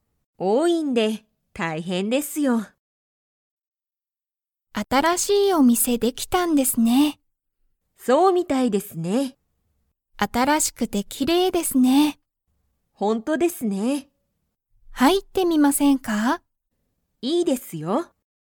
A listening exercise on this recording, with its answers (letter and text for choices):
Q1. 新(あたら)しいお店(みせ)は、____。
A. きれいだ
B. 多(おお)い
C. おいしい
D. 面白(おもしろ)い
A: A. きれいだ

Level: Level 1